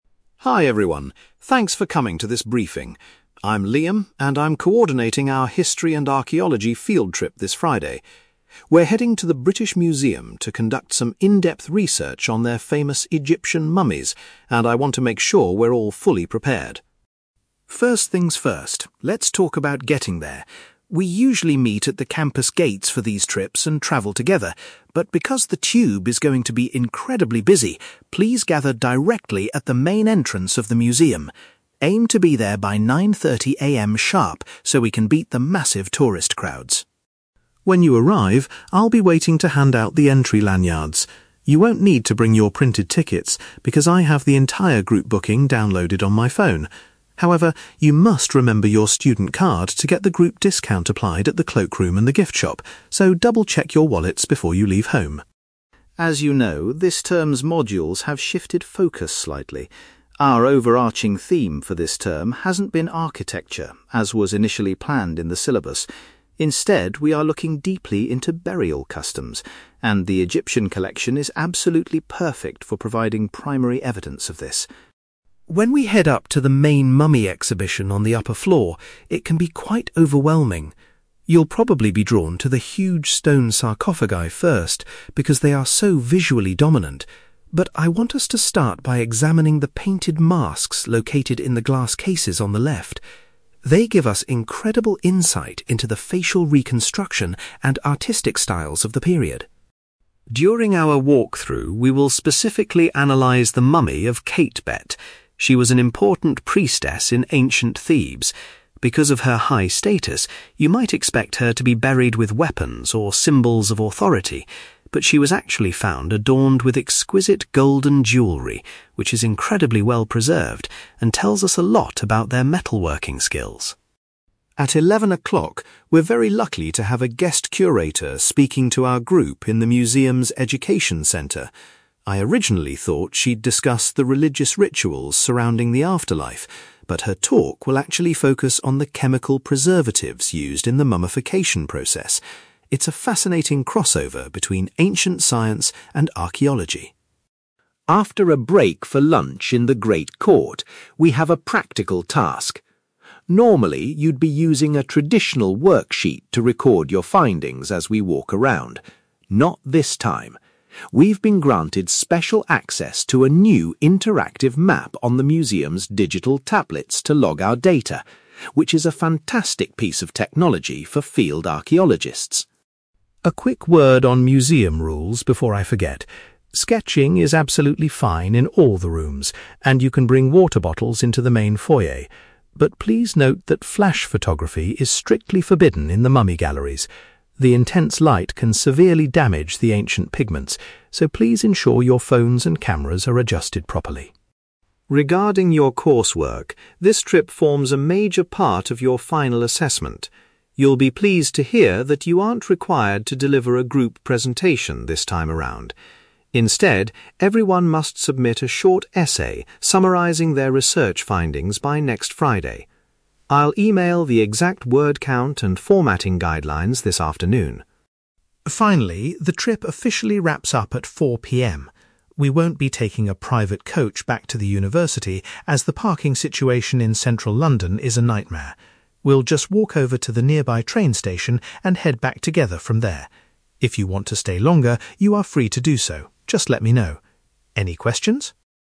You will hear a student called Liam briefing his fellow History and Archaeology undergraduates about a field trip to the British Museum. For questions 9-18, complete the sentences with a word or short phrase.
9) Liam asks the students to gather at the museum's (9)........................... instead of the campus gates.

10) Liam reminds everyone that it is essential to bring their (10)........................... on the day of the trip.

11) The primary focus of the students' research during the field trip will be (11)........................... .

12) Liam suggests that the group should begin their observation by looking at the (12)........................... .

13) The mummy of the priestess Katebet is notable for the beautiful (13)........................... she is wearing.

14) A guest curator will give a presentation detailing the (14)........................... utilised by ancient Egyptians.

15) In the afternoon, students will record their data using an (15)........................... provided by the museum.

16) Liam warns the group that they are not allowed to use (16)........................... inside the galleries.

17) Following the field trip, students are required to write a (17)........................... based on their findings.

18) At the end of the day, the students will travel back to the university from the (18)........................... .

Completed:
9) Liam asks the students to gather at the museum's main entrance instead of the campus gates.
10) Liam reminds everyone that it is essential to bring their student card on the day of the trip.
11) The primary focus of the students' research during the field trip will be burial customs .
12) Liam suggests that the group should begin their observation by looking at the painted masks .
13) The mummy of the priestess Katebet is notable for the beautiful golden jewellery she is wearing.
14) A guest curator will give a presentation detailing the chemical preservatives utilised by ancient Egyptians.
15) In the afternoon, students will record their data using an interactive map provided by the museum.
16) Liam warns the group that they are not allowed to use flash photography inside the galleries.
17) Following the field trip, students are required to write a short essay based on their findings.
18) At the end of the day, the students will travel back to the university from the train station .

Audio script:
Liam: Hi everyone, thanks for coming to this briefing. I'm Liam, and I'm coordinating our History and Archaeology field trip this Friday. We're heading to the British Museum to conduct some in-depth research on their famous Egyptian mummies, and I want to make sure we're all fully prepared.
First things first, let's talk about getting there. We usually meet at the campus gates for these trips and travel together, but because the tube is going to be incredibly busy, please gather directly at the main entrance of the museum. Aim to be there by 9:30 AM sharp so we can beat the massive tourist crowds.
When you arrive, I'll be waiting to hand out the entry lanyards. You won't need to bring your printed tickets, because I have the entire group booking downloaded on my phone. However, you must remember your student card to get the group discount applied at the cloakroom and the gift shop, so double-check your wallets before you leave home.
As you know, this term's modules have shifted focus slightly. Our overarching theme for this term hasn't been architecture, as was initially planned in the syllabus. Instead, we are looking deeply into burial customs, and the Egyptian collection is absolutely perfect for providing primary evidence of this.
When we head up to the main mummy exhibition on the upper floor, it can be quite overwhelming. You'll probably be drawn to the huge stone sarcophagi first, because they are so visually dominant. But I want us to start by examining the painted masks located in the glass cases on the left. They give us incredible insight into the facial reconstruction and artistic styles of the period.
During our walkthrough, we will specifically analyse the mummy of Katebet. She was an important priestess in ancient Thebes. Because of her high status, you might expect her to be buried with weapons or symbols of authority, but she was actually found adorned with exquisite golden jewellery, which is incredibly well preserved and tells us a lot about their metalworking skills.
At eleven o'clock, we're very lucky to have a guest curator speaking to our group in the museum's education centre. I originally thought she'd discuss the religious rituals surrounding the afterlife, but her talk will actually focus on the chemical preservatives used in the mummification process. It's a fascinating crossover between ancient science and archaeology.
After a break for lunch in the great court, we have a practical task. Normally, you'd be using a traditional worksheet to record your findings as we walk around. Not this time! We've been granted special access to a new interactive map on the museum's digital tablets to log our data, which is a fantastic piece of technology for field archaeologists.
A quick word on museum rules before I forget. Sketching is absolutely fine in all the rooms, and you can bring water bottles into the main foyer. But, please note that flash photography is strictly forbidden in the mummy galleries. The intense light can severely damage the ancient pigments, so please ensure your phones and cameras are adjusted properly.
Regarding your coursework, this trip forms a major part of your final assessment. You'll be pleased to hear that you aren't required to deliver a group presentation this time around. Instead, everyone must submit a short essay summarising their research findings by next Friday. I'll email the exact word count and formatting guidelines this afternoon.
Finally, the trip officially wraps up at 4 PM. We won't be taking a private coach back to the university, as the parking situation in central London is a nightmare. We'll just walk over to the nearby train station and head back together from there. If you want to stay longer, you are free to do so, just let me know. Any questions?

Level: B2